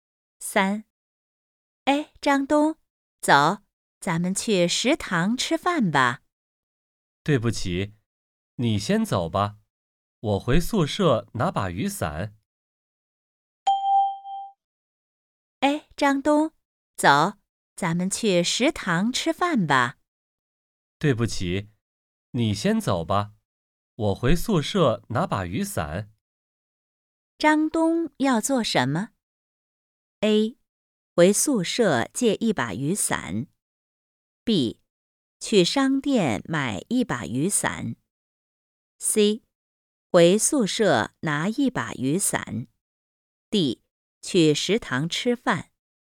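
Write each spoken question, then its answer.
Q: 张东要做什么?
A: C: 回宿舍拿一把雨伞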